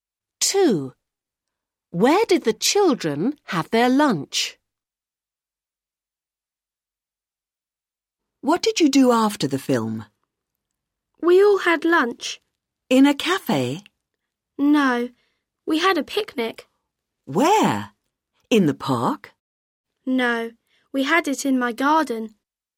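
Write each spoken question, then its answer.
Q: Where did the children have their lunch?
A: in the garden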